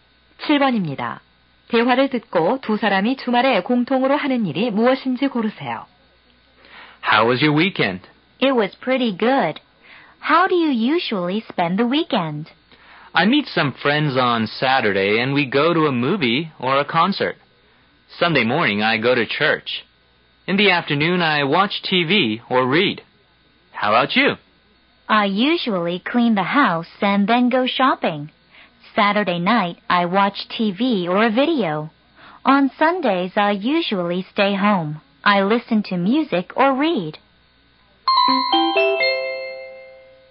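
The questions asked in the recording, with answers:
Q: 대화를 듣고 두 사람이 주말에 공통으로 하는 일이 무엇인지 고르세요.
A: TV 시청과 독서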